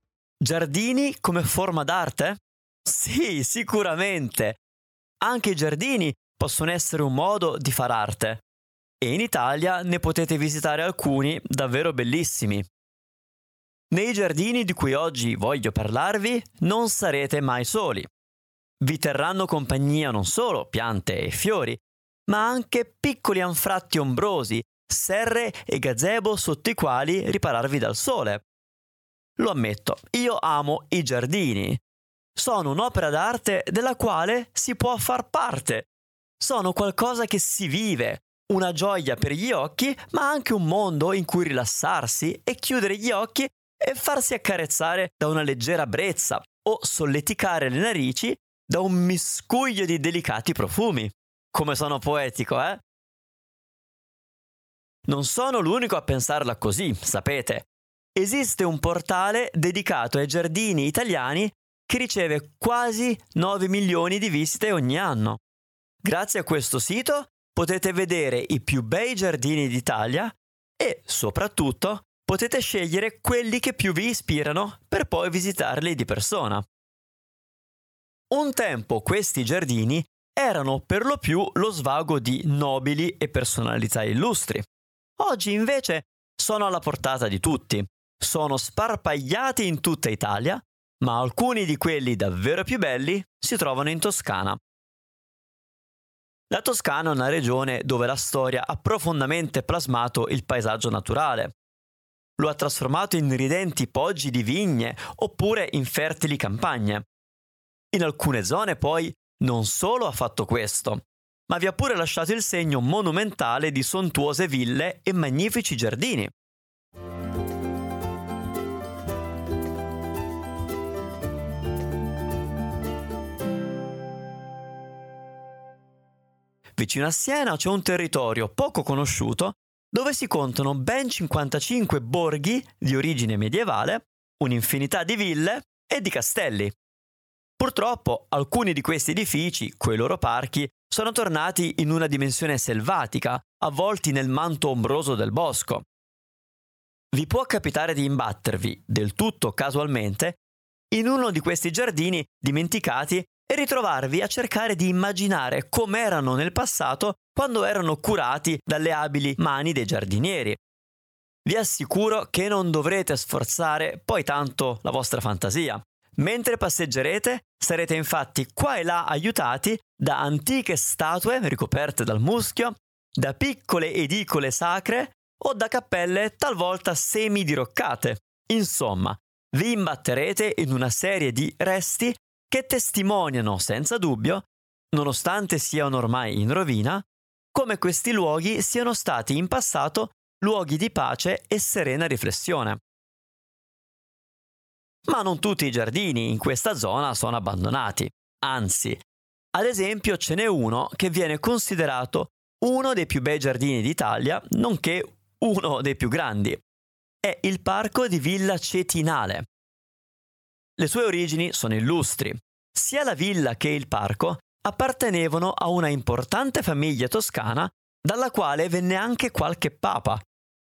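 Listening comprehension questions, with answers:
Here are your TRUE/ FALSE Comprehension questions.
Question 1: I giardini sono una forma d'arte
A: True

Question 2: Un tempo tutte le case avevano grandi giardini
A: False

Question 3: Solo poche persone visitano i grandi giardini italiani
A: False

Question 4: La Toscana è ricca di giardini bellissimi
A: True

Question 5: Vicino a Siena c'è solo un piccolo castello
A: False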